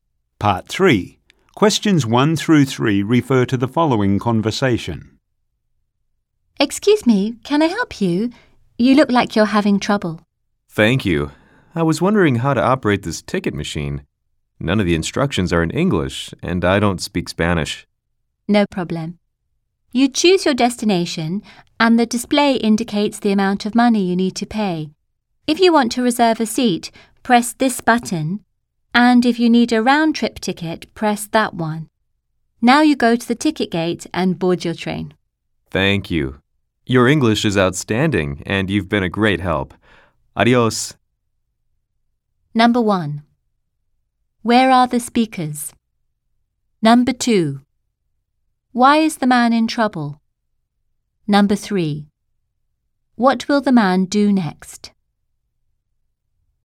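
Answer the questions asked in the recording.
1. At a train station, at a ticket machine
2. He can't read the ticket machine's instructions because they aren't in English
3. Go to the ticket gate and board his train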